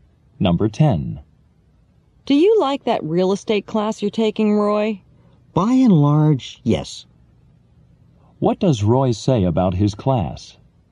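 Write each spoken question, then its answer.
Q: What does Roy say about his class?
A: He generally likes it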